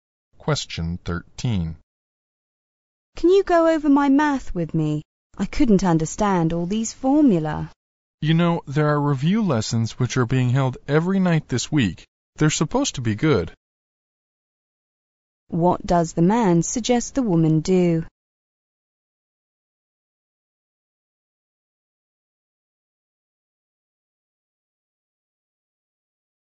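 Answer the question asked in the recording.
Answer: Go to the review lessons held every night this week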